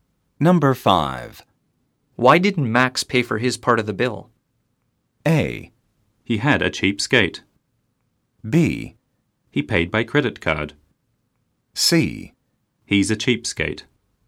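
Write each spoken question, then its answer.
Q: Why didn't Max pay for his part of the bill?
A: C: He's a cheapskate.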